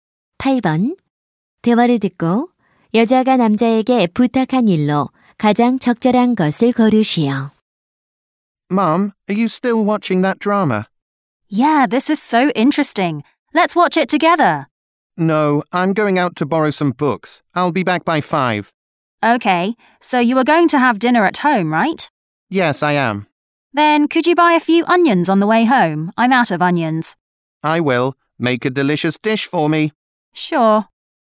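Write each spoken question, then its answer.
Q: 8번. 대화를 듣고 여자가 남자에게 부탁한 일로 가장 적절한 것을 거르시오.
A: 집에 오는 길에 양파 사 오기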